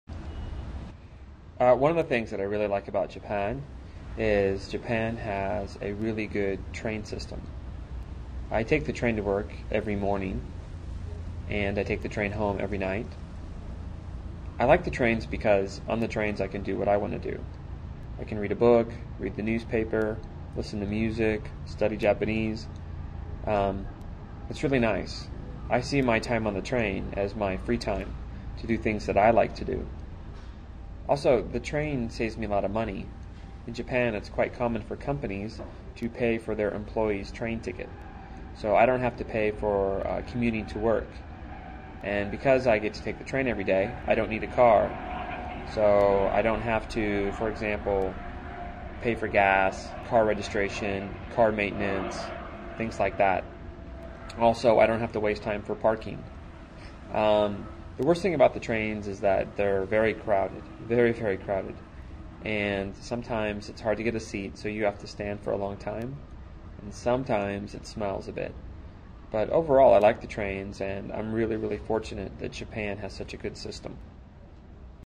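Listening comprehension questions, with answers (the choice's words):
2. What does he do on the train?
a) Nothing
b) Sleep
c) Read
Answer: Read

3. Who pays for his train fare?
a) Himself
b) His company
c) His family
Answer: His company

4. How does he feel about driving?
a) It's expensive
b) It's cheap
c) It's better than the train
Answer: It's expensive

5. What is the worst thing about the train?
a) The costs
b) The crowds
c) The boredom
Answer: The crowds

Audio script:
Todd: One of the things that I really like about Japan is Japan has a really good train system. I take the train to work every morning and I take the train home every night. I like the trains because on the trains I can do what I want to do. I can read a book, read the newspaper, listen to music, study Japanese. Um, it's really nice. I see my time on the train as my free-time, to do things that I like to do. Also, the train saves me a lot of money. 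In Japan it's quite common for companies to pay for their employees train ticket, so I don't have to pay for commuting to work. And because I get to take the train every day, I don't need a car so I don't have to for example pay for gas, car registration, car maintenance, things like that. Also, I don't have to waste time for parking. Um, the worst thing about the trains is that they're very crowded. Very, very crowded, and sometimes it's hard to get a seat so you have to stand for a long time, and sometimes it smells a bit, but overall I like the trains and I'm really, really fortunate that Japan has such a good system.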